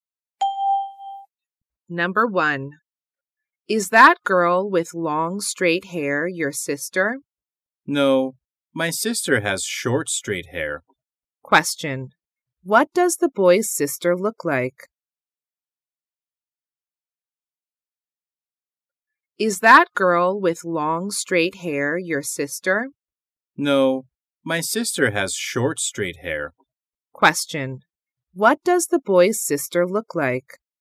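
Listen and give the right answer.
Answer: She has short straight hair.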